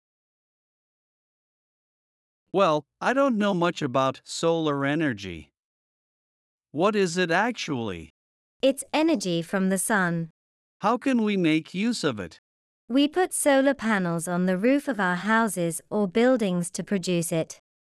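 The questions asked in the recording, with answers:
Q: What is solar energy?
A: Energy from the sun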